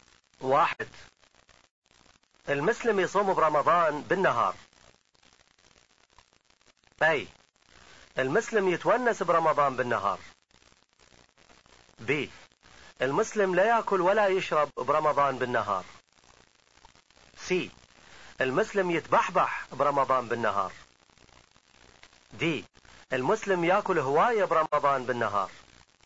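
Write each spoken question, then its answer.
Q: المسلم يصوم برمضان بالنهار.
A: ب: المسلم لا يأكل ولا يشرب برمضان بالنهار.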